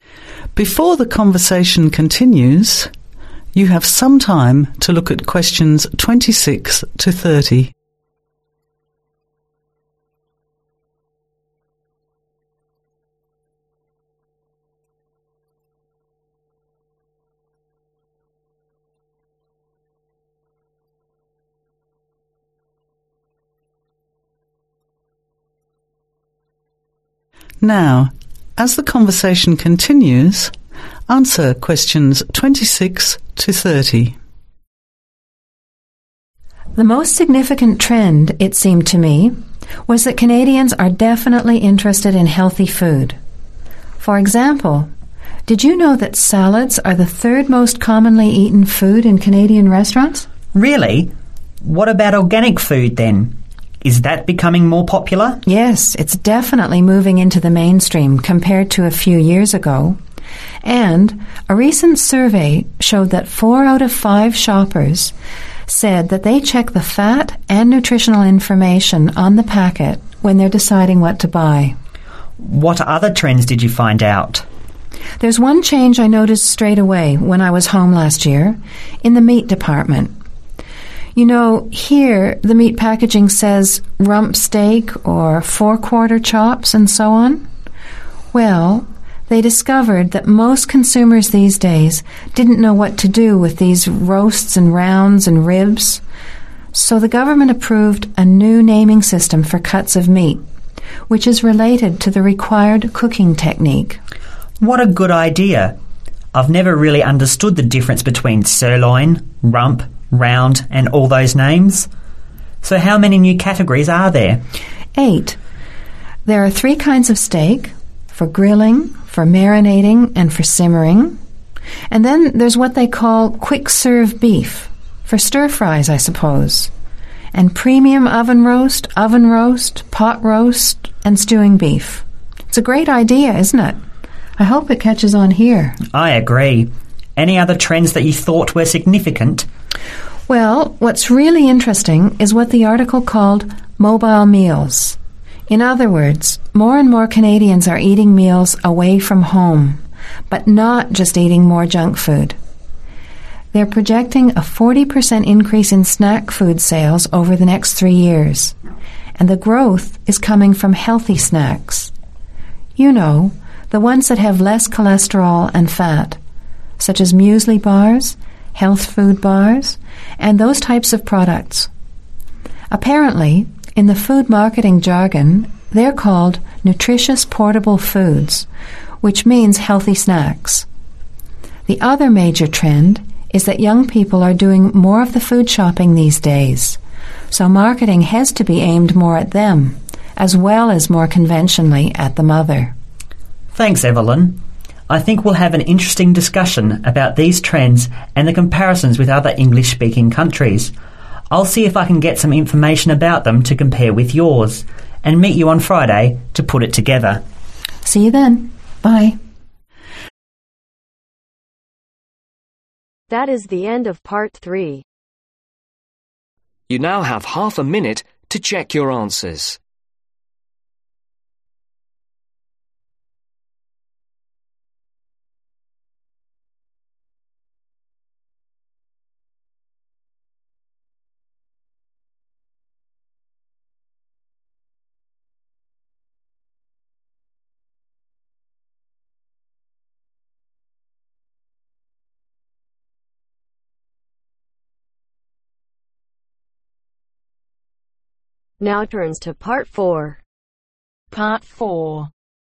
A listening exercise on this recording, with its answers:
Complete the table below. Write ONE WORD OR A NUMBER for each answer.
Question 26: Salads are the third most commonly eaten food in Canadian (26)............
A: restaurants

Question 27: Most shoppers check (27)............ and nutritional information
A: fat

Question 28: Labelled according to (28)............ technique eg simmering steak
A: cooking

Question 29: (29)............ increase in sales of snacks projected over next 3 years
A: 40%

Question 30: Growth in (30)............ snacks such as muesli bars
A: healthy